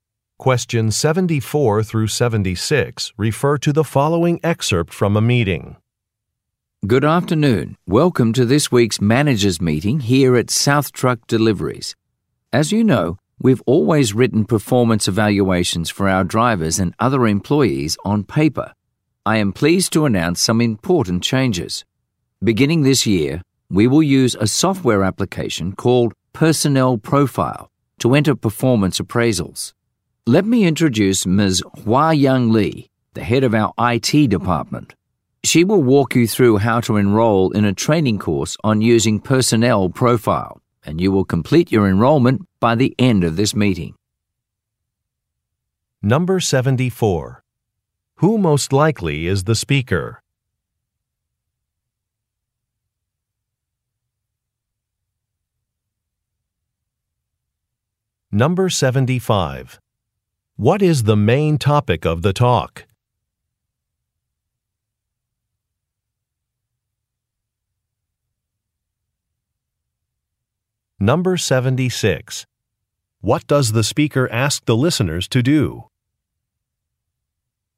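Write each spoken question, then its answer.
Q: What is the main topic of the talk?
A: A new software application for performance evaluations

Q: What does the speaker ask the listeners to do?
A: Enroll in a training course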